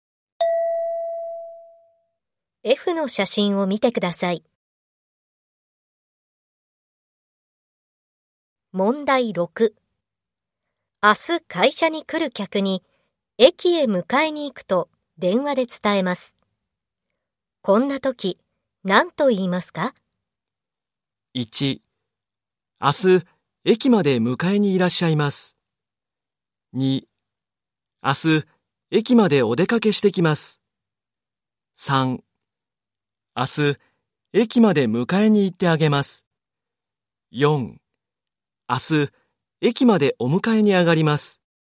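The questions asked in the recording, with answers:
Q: 明日会社に来る客に駅へ迎えに行くと電話で伝えます。こんな時、何と言いますか?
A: 4: 明日駅までお迎えに上がります。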